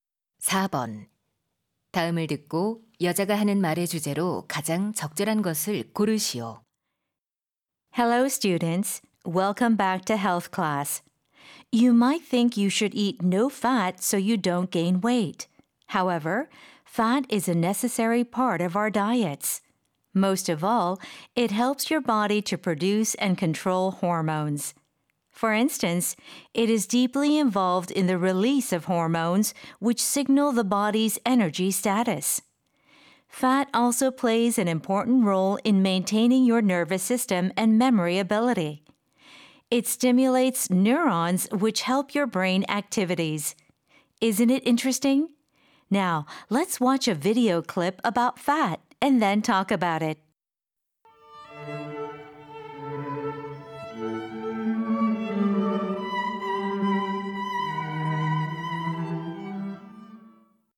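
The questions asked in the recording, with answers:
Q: 다음을 듣고 여자가 하는 말의 주제로 가장 적절한 것을 고르시오.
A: 지방이 식단에 필요한 이유(호르몬, 신경계와 기억력에 대한 역할)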